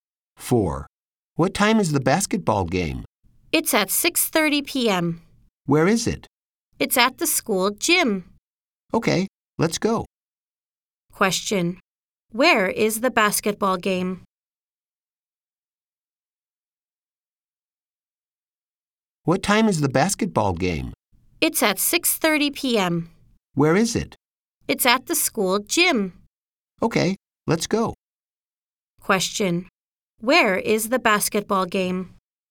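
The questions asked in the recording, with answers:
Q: Where is the basketball game?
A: At the school gym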